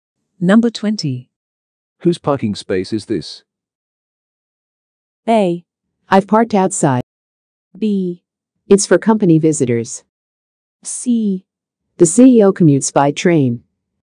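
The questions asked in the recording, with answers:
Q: Whose parking space is this?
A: B: It's for company visitors.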